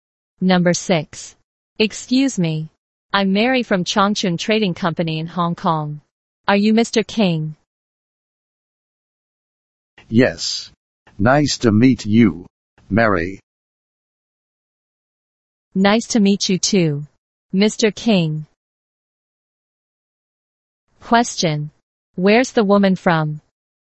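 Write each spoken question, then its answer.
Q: Where's the woman from?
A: Hong Kong (a trading company in Hong Kong)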